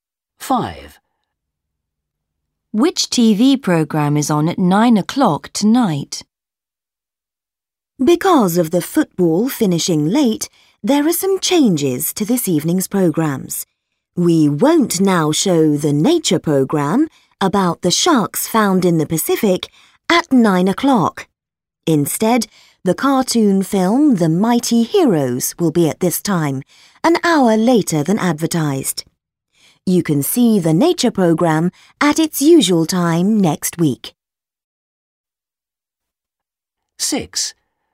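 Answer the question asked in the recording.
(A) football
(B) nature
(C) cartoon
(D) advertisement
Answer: (C) cartoon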